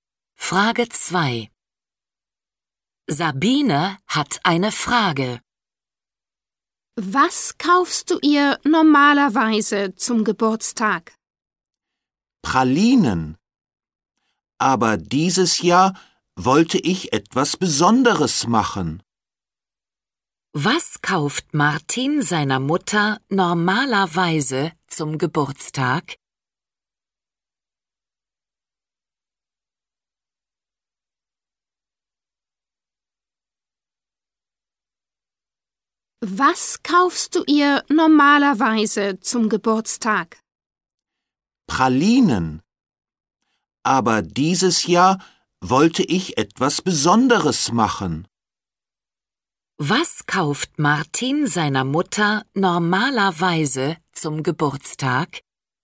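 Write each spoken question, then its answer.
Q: Was kauft Martin seiner Mutter normalerweise zum Geburtstag?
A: Pralinen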